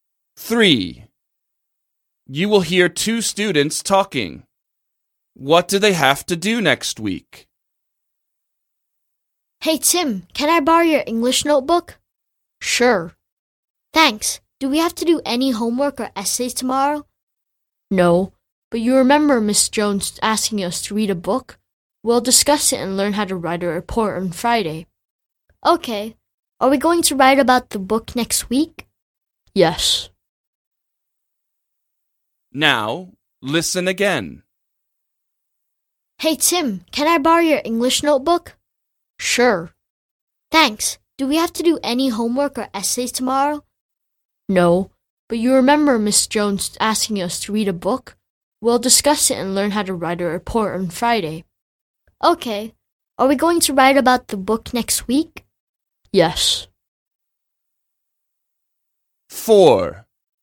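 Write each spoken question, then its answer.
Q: What do they have to do next week?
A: Write about the book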